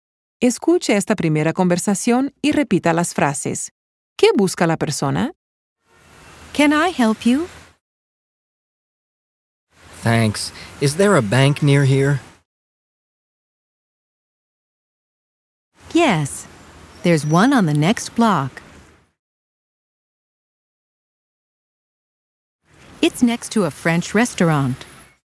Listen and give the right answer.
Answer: El caballero está buscando un banco.